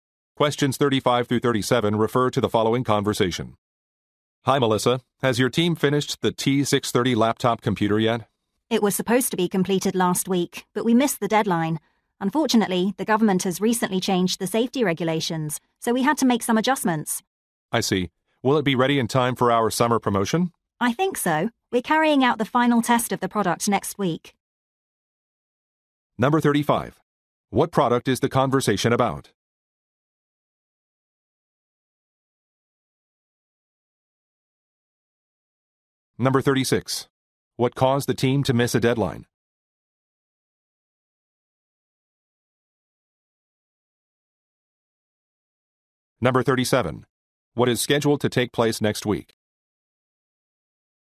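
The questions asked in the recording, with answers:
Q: What product is the conversation about?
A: A laptop computer

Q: What caused the team to miss a deadline?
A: The government changed the safety regulations

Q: What is scheduled to take place next week?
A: The final test of the product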